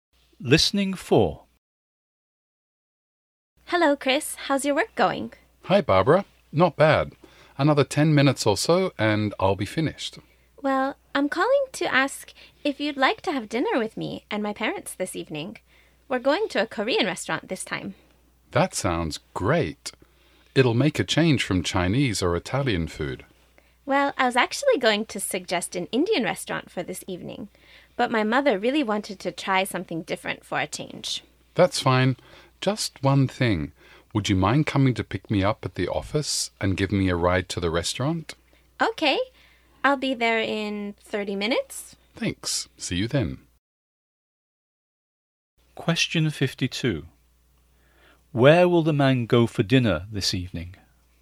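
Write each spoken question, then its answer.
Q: Where will the man go for dinner this evening?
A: To a Korean restaurant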